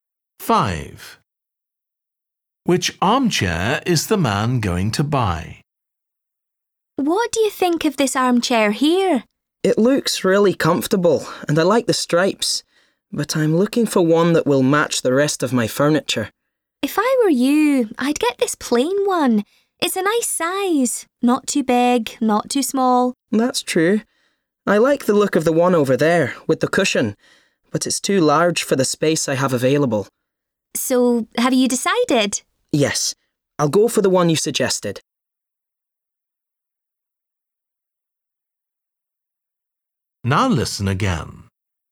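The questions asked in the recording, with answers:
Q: Which armchair is the man going to buy?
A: The plain one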